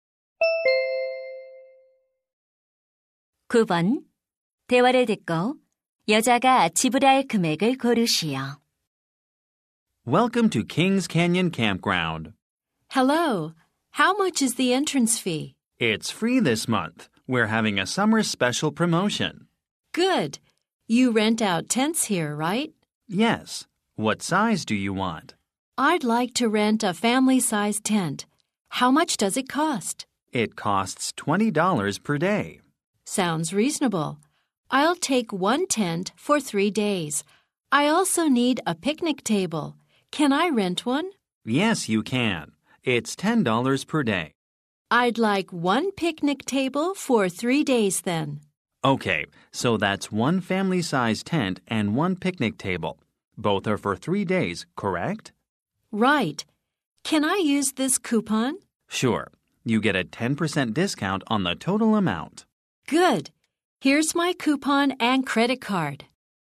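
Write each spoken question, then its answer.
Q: 대화를 듣고 여자가 지불할 금액을 고르시오.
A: $81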